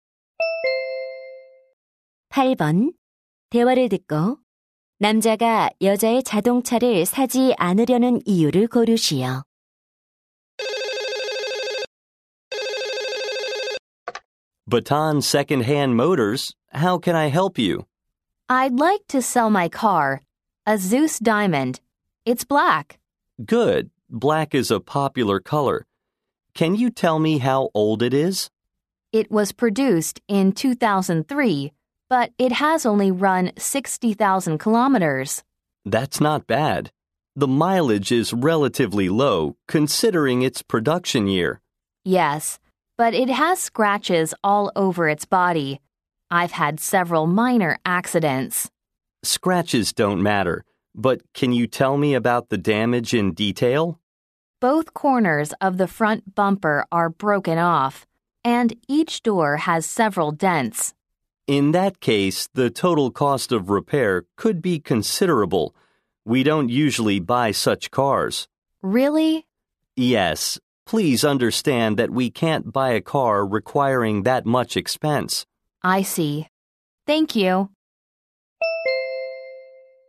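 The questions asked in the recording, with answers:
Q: 대화를 듣고 남자가 여자의 자동차를 사지 않으려는 이유를 고르시오.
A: 수리 비용이 너무 많이 들어서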